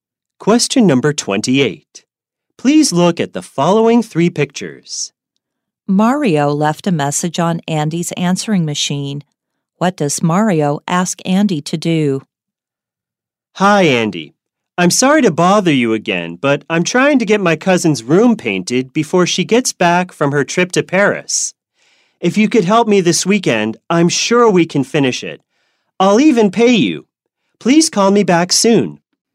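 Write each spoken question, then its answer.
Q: What does Mario ask Andy to do?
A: Help him paint his cousin's room this weekend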